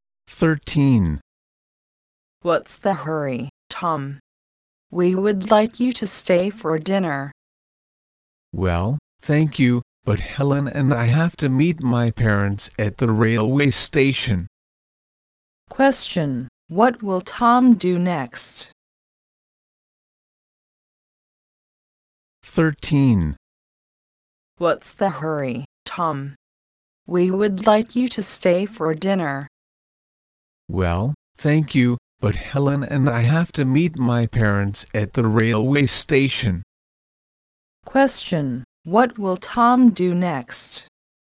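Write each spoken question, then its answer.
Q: what will Tom do next?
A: Meet his parents at the railway station with Helen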